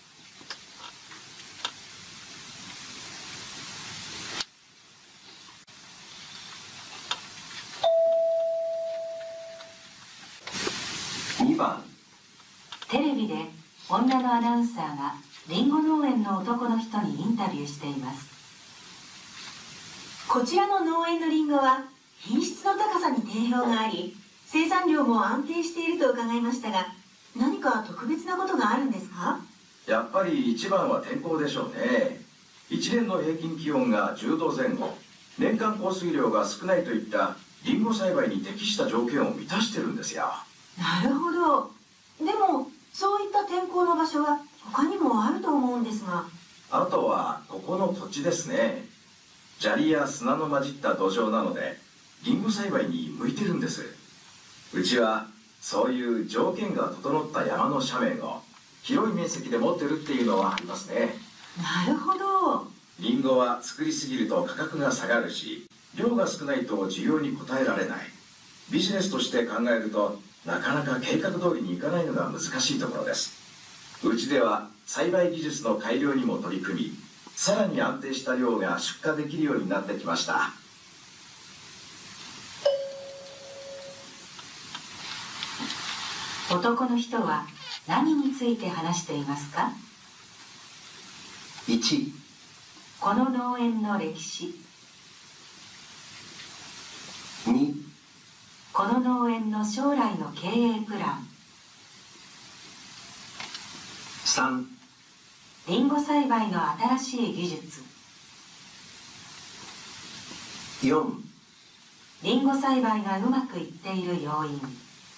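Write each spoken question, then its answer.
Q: 男の人は何について話していますか?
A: 4: リンゴ栽培がうまくいっている要因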